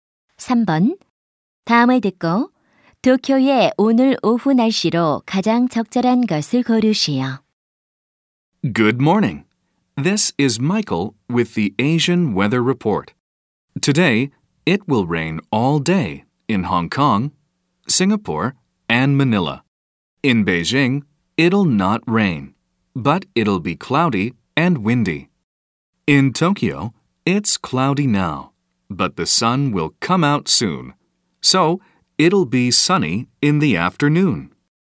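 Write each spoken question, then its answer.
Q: 다음을 듣고 도쿄의 오늘 오후 날씨로 가장 적절한 것을 고르시오.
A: 맑음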